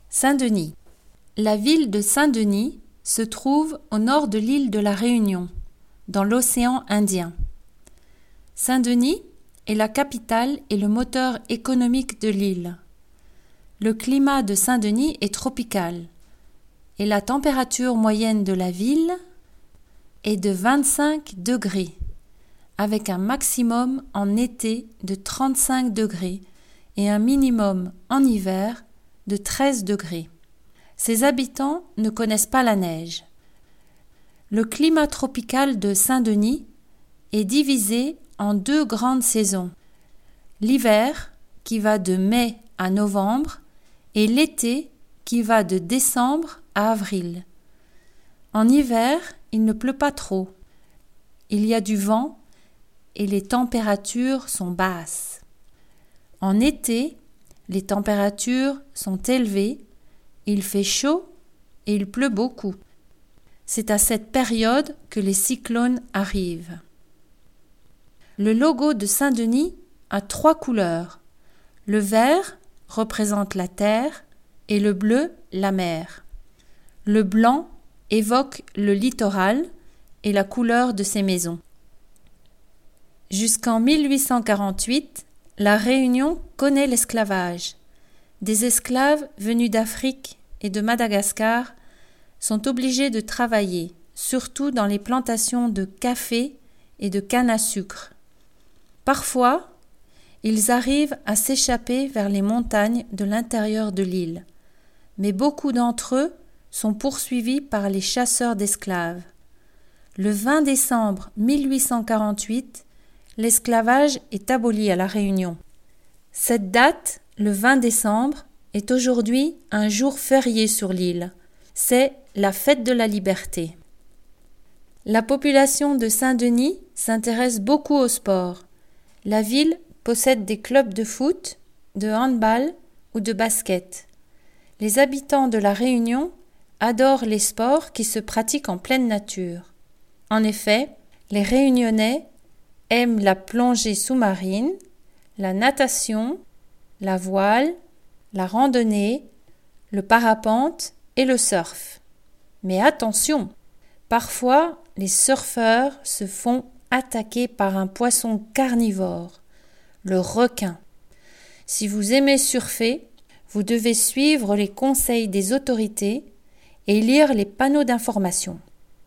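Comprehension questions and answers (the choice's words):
Écoutez l'enregistrement et choisissez la réponse correcte sans regarder la transcription:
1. Saint-Denis se trouve...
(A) à l'est.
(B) au nord.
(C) au sud.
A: au nord.

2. À Saint-Denis, l'hiver dure...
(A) de décembre à avril.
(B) de mai à novembre.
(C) de novembre à mars.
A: de mai à novembre.

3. Il y a des cyclones...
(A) au printemps.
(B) en été.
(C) en hiver.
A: en été.

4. Sur le logo de Saint-Denis, le bleu représente...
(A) l'océan.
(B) la terre.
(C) le ciel.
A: l'océan.

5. Avant 1848, les esclaves travaillent dans les plantations...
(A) de café et de canne à sucre.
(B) de café et de coton.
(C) de canne à sucre et de coton.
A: de café et de canne à sucre.

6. La Fête de la Liberté a lieu le...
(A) 20 décembre.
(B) 25 décembre.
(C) 28 décembre.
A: 20 décembre.

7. Les Réunionnais aiment...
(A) la plongée.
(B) le ski.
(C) le volleyball.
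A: la plongée.

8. Quelquefois, les surfeurs se font attaquer par...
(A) des baleines.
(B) des dauphins.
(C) des requins.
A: des requins.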